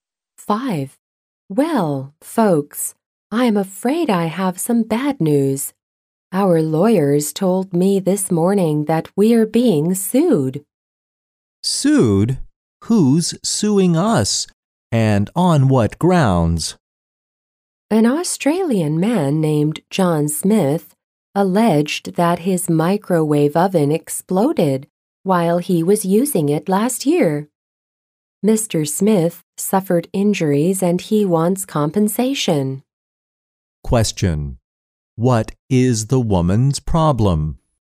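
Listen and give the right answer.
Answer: Her company is being sued by a customer whose microwave oven exploded.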